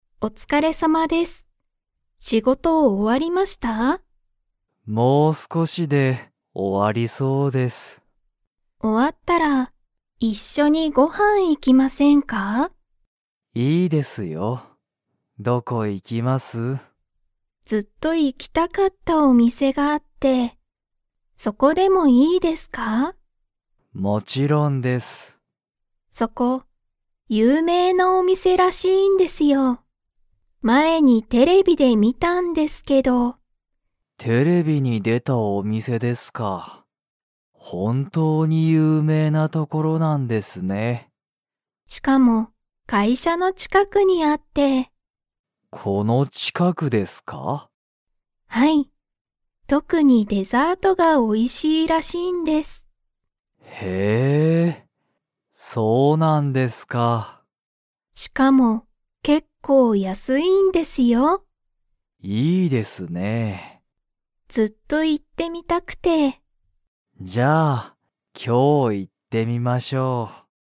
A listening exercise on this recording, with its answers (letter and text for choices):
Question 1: 鈴木すずきさんは、もう仕事しごとが終おわりましたか?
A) はい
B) いいえ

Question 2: そのお店みせは____らしい。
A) あまり有名ゆうめいじゃない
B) デザートが美味おいしい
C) 全然安ぜんぜんやすくない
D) テレビがある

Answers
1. B) いいえ
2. B) デザートが美味おいしい

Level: Level 2